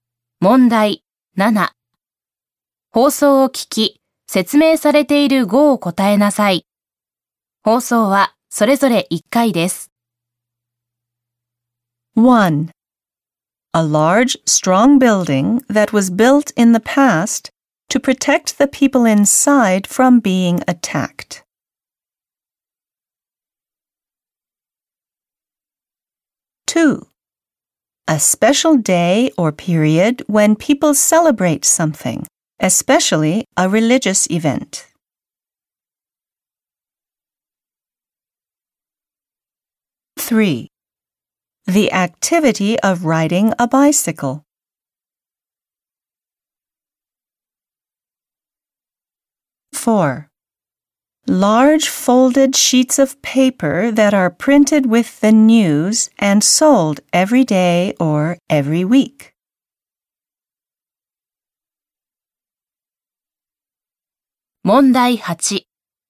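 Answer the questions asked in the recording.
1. castle
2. festival
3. cycling
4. newspaper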